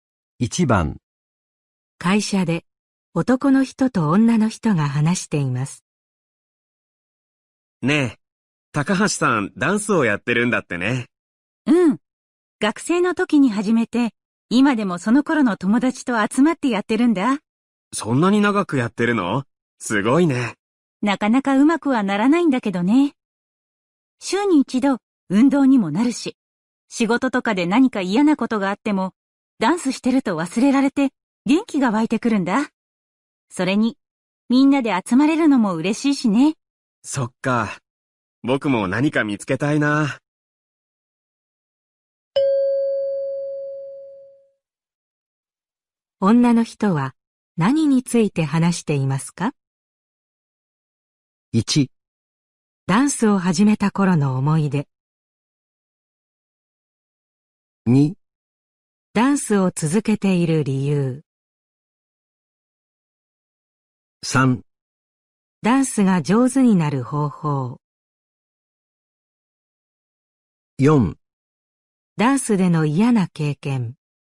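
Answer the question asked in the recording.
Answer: 2: ダンスを続けている理由。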